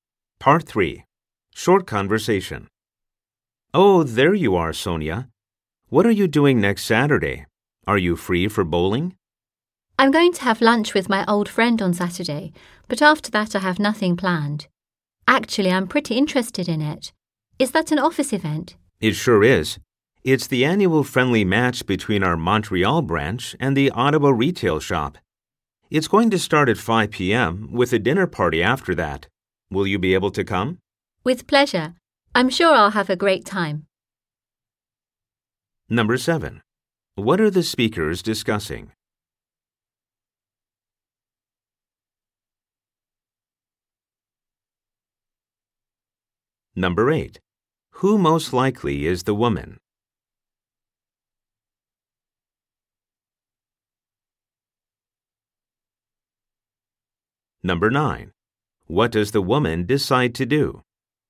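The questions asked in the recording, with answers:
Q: What are the speakers discussing?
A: A company bowling event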